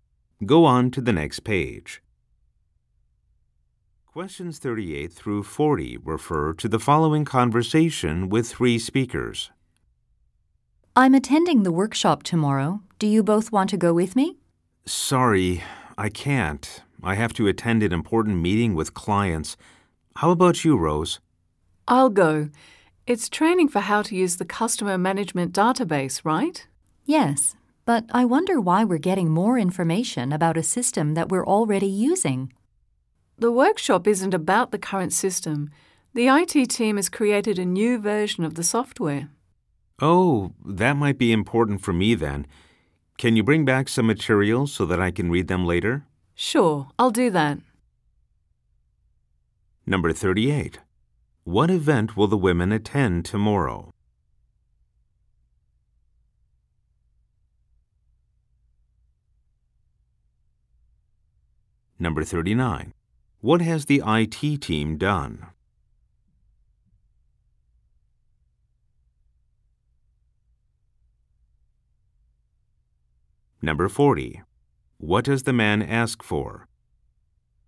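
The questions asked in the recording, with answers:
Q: What event will the women attend tomorrow?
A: A training workshop on the customer management database

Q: What has the IT team done?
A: Created a new version of the software

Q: What does the man ask for?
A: Workshop materials to read later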